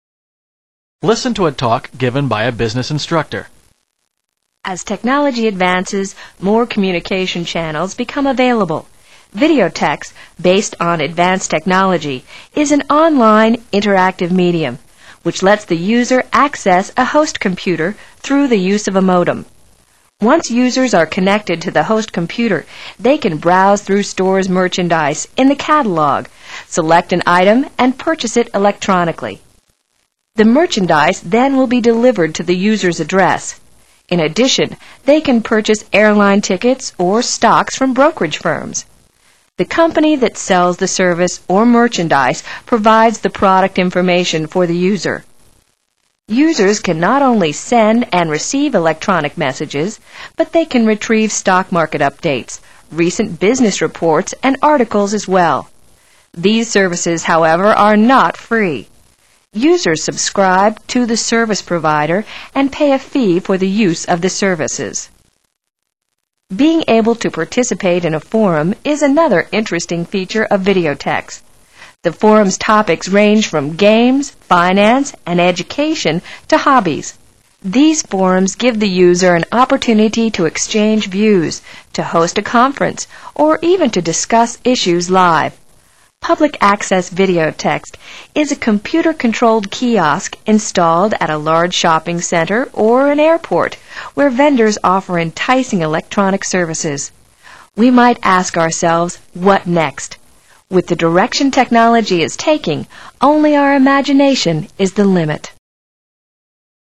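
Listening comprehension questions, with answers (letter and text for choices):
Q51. How does a user purchase a service or a product?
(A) By calling up customer service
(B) By filling out the catalog order form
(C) By performing an electronic transaction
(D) By contacting a sales representative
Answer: (C) By performing an electronic transaction

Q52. What is the user required to do in order to use the videotex services?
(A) Host a debate on any subject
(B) Subscribe to the database provider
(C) Reserve an airline ticket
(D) Contact an on-line stockbroker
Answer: (B) Subscribe to the database provider

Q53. What is "Public Access Videotex"?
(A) A community access video tape program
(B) A computerized information center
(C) A warehouse outlet store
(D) A publishing fulfillment house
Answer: (B) A computerized information center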